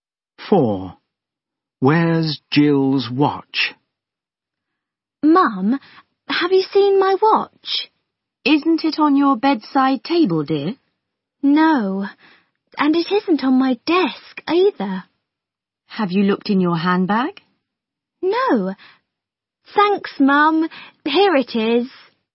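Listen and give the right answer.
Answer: in her handbag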